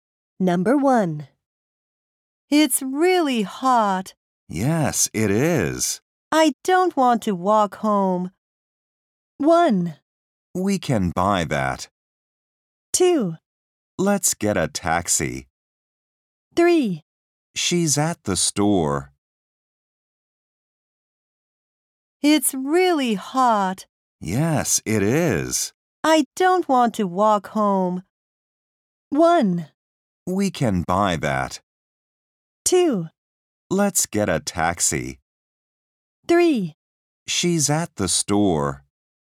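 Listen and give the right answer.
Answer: 2: Let's get a taxi.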